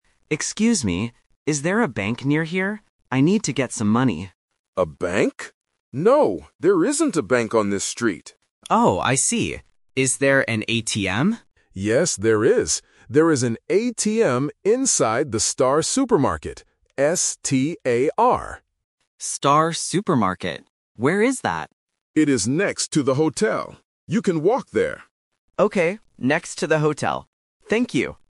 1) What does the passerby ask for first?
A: A bank

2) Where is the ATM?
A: Inside the supermarket

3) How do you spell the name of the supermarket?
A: S-T-A-R